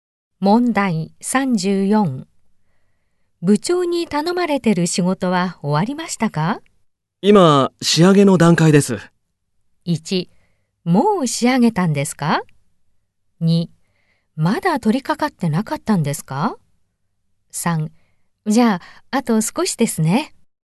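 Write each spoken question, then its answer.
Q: 部長に頼まれてる仕事は終わりましたか?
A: 3: じゃあ、あと少しですね。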